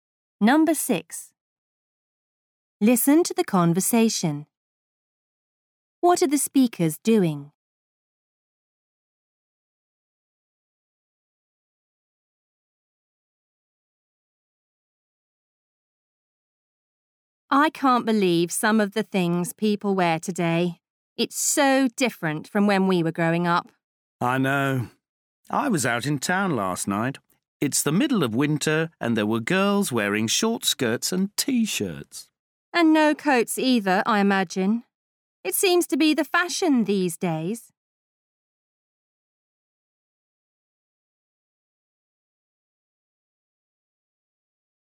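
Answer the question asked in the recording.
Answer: Discussing/criticising what people wear today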